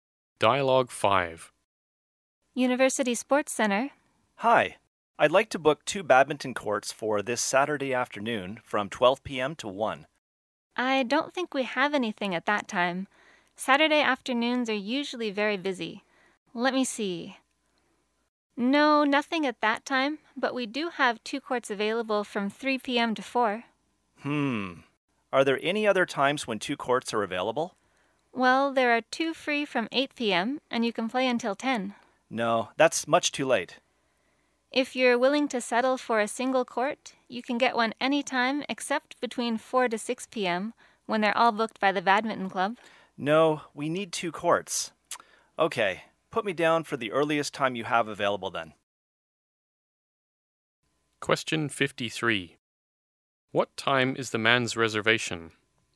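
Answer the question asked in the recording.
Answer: 3 p.m. to 4 p.m.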